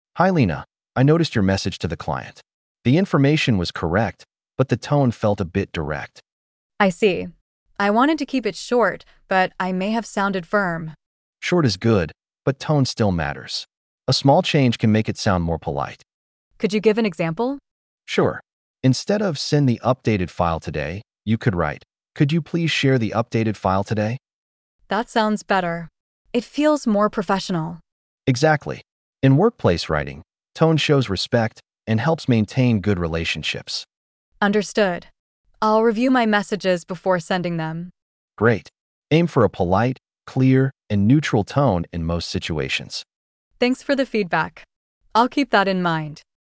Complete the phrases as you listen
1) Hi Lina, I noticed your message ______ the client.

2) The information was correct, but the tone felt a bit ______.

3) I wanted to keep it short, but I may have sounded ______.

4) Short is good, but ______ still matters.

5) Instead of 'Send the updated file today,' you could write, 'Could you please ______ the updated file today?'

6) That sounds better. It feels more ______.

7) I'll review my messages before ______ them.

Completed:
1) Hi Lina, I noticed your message to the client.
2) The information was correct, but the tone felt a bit direct.
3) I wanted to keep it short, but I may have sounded firm.
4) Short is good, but tone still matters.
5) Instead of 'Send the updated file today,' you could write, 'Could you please share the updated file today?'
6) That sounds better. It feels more professional.
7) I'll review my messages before sending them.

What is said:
Manager: Hi Lina, I noticed your message to the client. The information was correct, but the tone felt a bit direct.
Lina: I see. I wanted to keep it short, but I may have sounded firm.
Manager: Short is good, but tone still matters. A small change can make it sound more polite.
Lina: Could you give an example?
Manager: Sure. Instead of "Send the updated file today," you could write, "Could you please share the updated file today?"
Lina: That sounds better. It feels more professional.
Manager: Exactly. In workplace writing, tone shows respect and helps maintain good relationships.
Lina: Understood. I'll review my messages before sending them.
Manager: Great. Aim for a polite, clear, and neutral tone in most situations.
Lina: Thanks for the feedback. I'll keep that in mind.